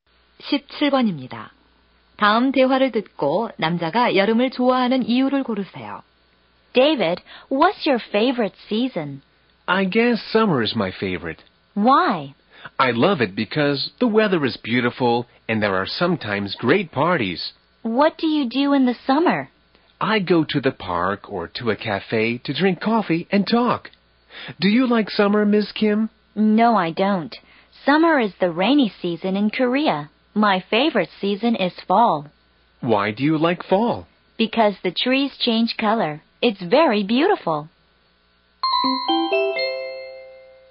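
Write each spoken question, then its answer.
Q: 다음 대화를 듣고 남자가 여름을 좋아하는 이유를 고르세요.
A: 날씨가 좋고 가끔 멋진 파티가 있어서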